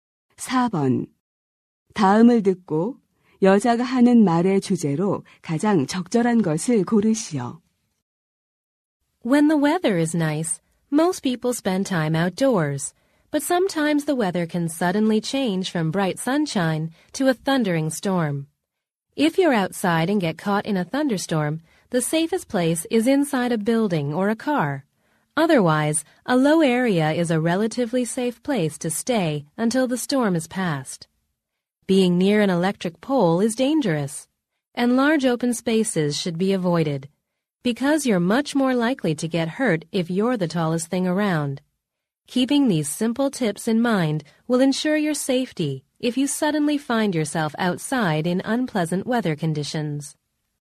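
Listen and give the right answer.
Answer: 야외에서 뇌우를 만났을 때의 안전 수칙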